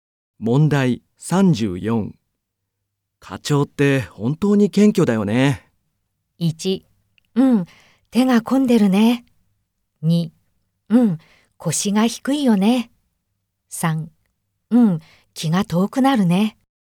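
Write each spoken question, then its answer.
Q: 課長って本当に謙虚だよね。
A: 2: うん、腰が低いよね。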